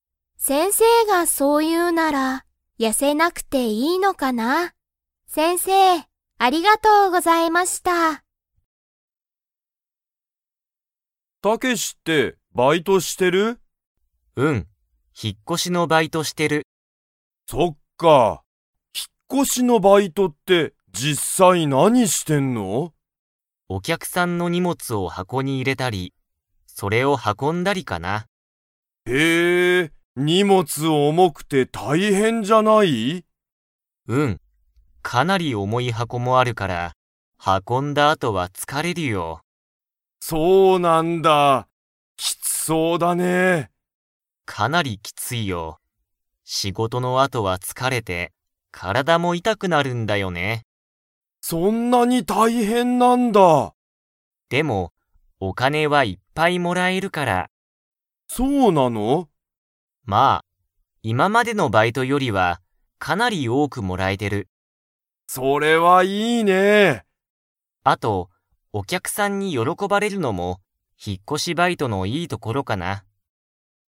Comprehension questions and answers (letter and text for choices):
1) 引ひっ越こしのバイトは、どんなことをしますか?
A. お客きゃくさんにお金かねをあげる。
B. お客きゃくさんの荷物にもつを運はこぶ。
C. お客きゃくさんと話はなす。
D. お客きゃくさんの荷物にもつを買かう。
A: B. お客きゃくさんの荷物にもつを運はこぶ。

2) 引ひっ越こしのバイトは、お金かねが 。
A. いっぱいもらえる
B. 全然ぜんぜんもらえない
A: A. いっぱいもらえる

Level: Level 4